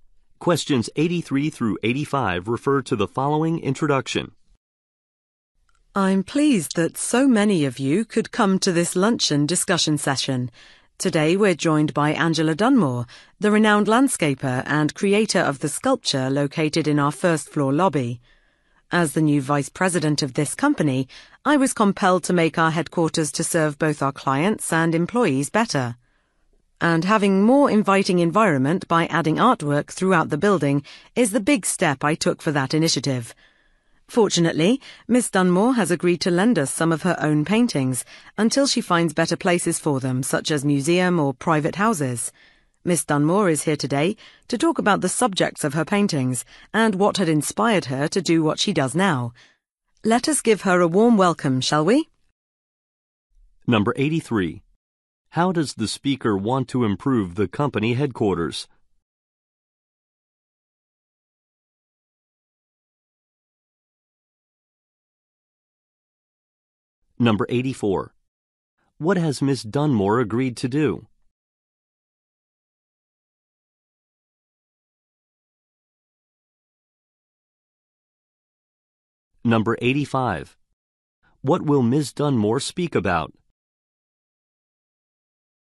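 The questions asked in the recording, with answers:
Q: How does the speaker want to improve the company headquarters?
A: By adding artwork throughout the building

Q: What has Miss Dunmore agreed to do?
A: Lend some of her paintings

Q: What will Miss Dunmore speak about?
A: The subjects of her paintings and her inspiration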